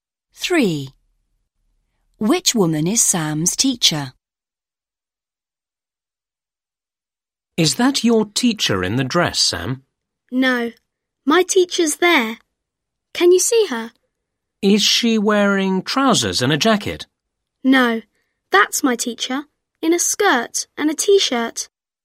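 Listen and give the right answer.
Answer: the one in a skirt and a t-shirt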